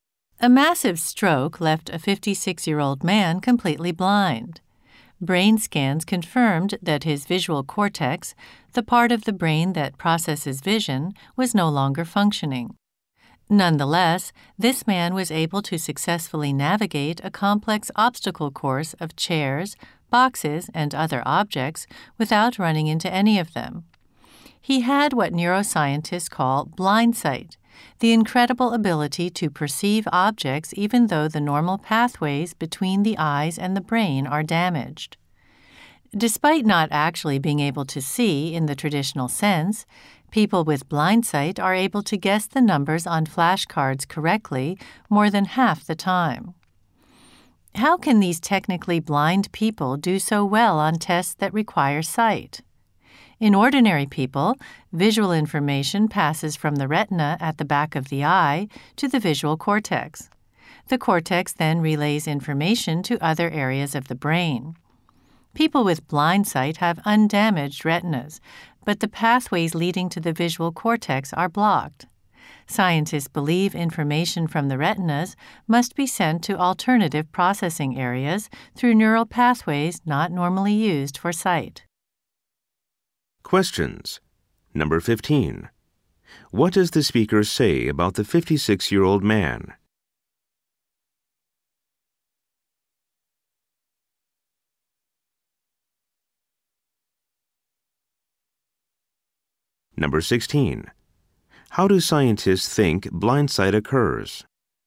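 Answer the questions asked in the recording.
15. He was completely blind after a stroke but could still get through an obstacle course without hitting anything (blindsight).
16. Information from the retinas is sent to other processing areas through neural pathways not normally used for sight.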